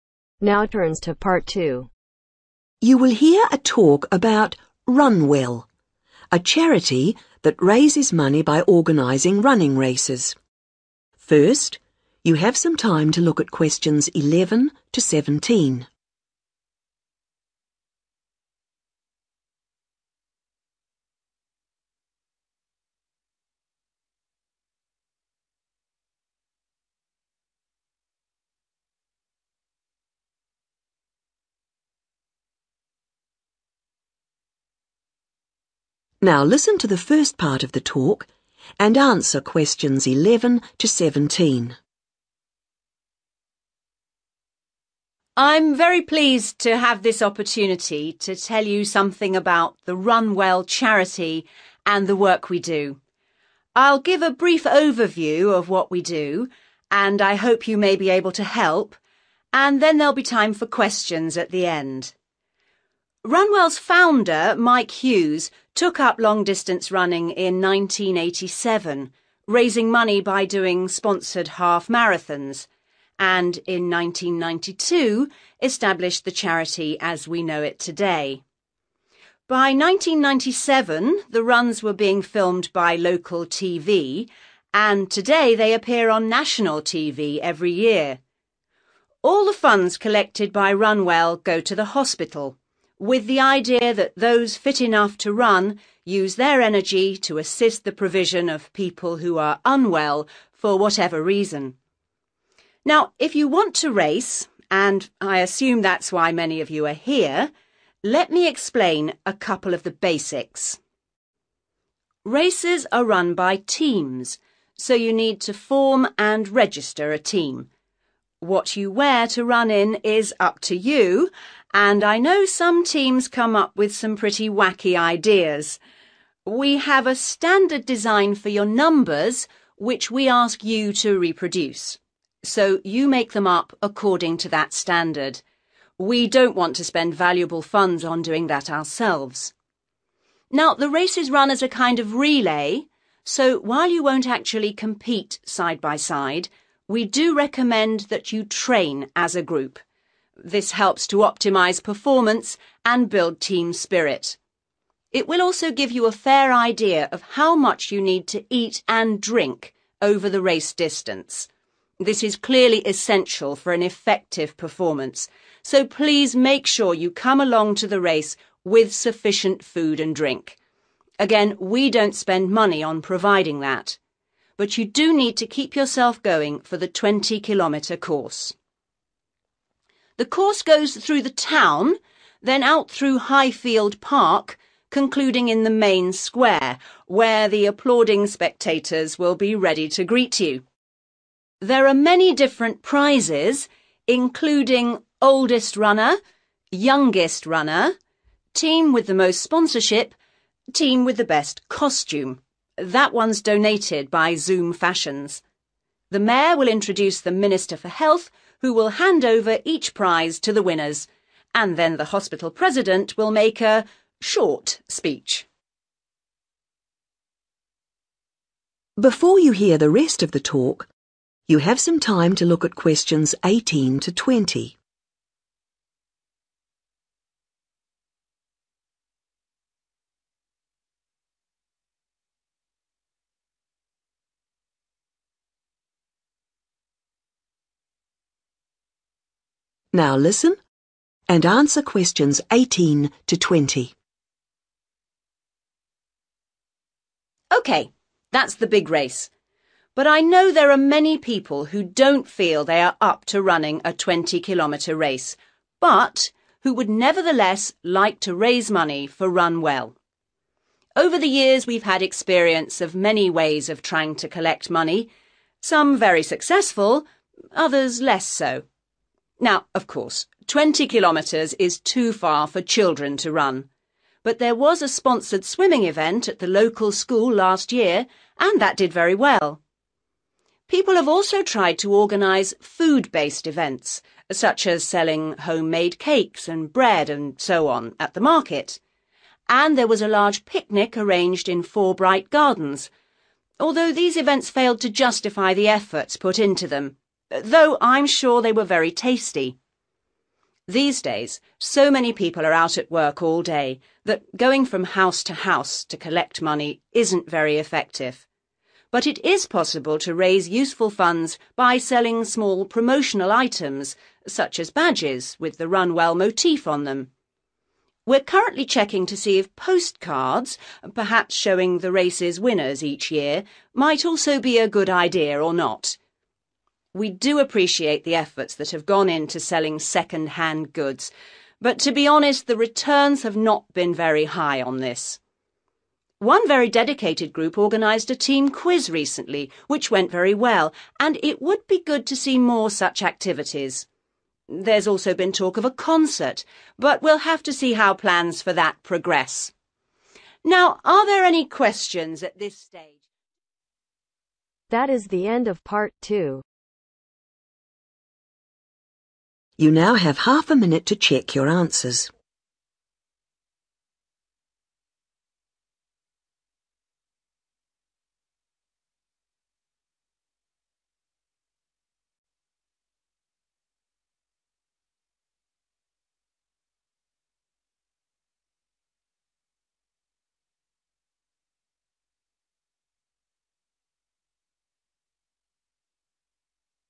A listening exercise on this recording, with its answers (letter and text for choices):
Complete the notes below. Write NO MORE THAN TWO WORDS AND/OR A NUMBER for each answer.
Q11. Set up in 11 .............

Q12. Aim: raise money for the 12 ..............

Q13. Team to supply own 13 ...............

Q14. Team should 14 ............... together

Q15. Important to bring enough 15 ......... and ........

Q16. Race will finish in the 16 .............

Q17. Prizes given by the 17 .......... for ..........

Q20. Which THREE ways of raising money for the charity are recommended ?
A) badges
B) bread and cake stall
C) swimming event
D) concer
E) door-to-door collecting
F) picnic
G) postcards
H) quiz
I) second-hand sale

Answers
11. 1992
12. hospital
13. numbers
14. train
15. food – drink
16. main square
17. minister – health
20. H) quiz